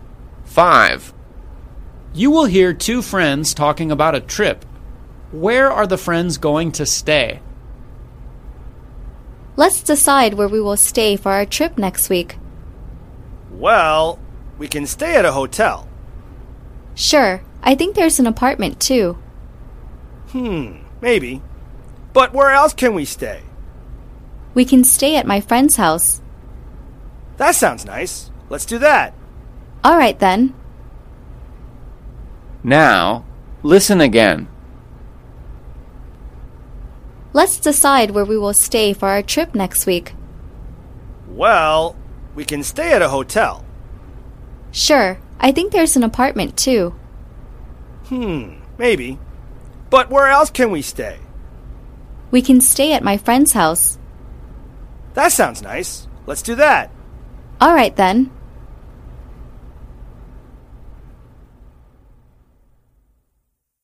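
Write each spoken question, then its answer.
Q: Where are the friends going to stay?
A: At a friend's house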